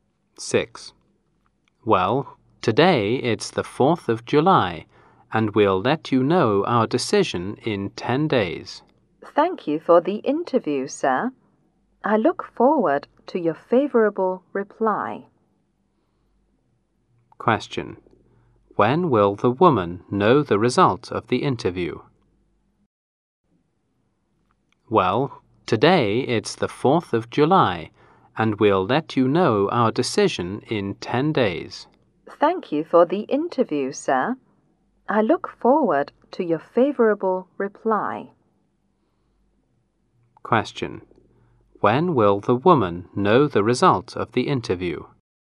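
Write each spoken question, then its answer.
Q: When will the woman know the result of the interview?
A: On July 14th (in 10 days)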